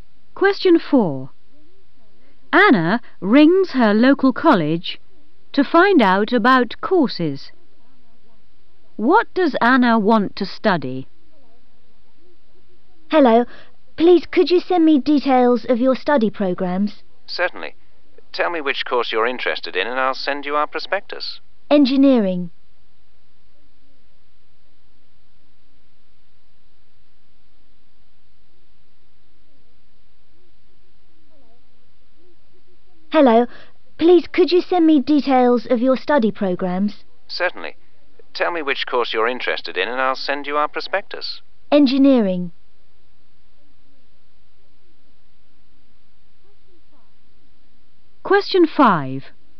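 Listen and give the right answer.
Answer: Engineering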